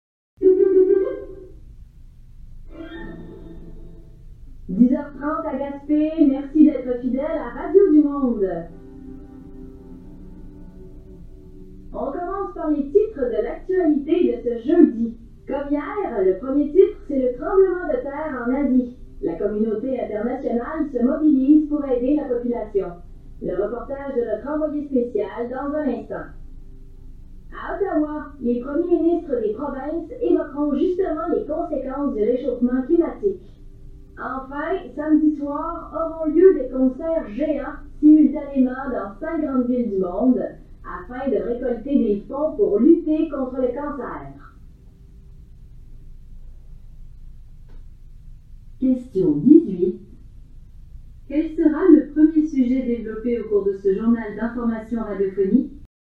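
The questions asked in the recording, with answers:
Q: Quel sera le premier sujet développé au cours de ce journal d'information radiophonique?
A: Le tremblement de terre en Asie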